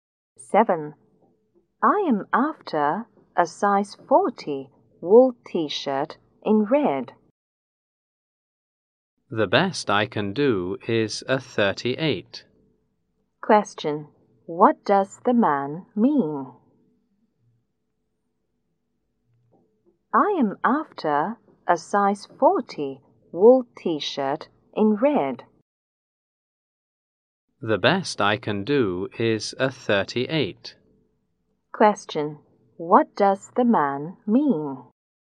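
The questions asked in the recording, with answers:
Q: What does the man mean?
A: He doesn't have size 40; the largest he has is 38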